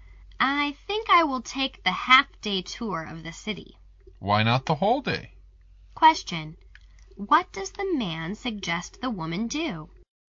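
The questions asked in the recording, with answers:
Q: What does the man suggest the woman do?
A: Take the whole-day tour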